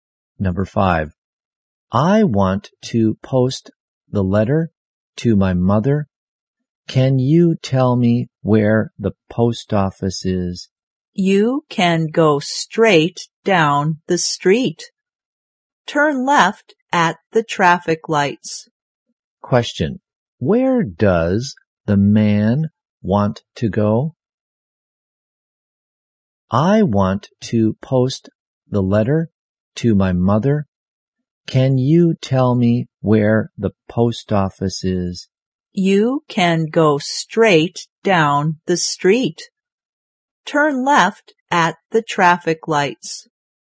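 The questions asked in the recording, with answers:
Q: Question. Where does the man want to go?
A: The post office.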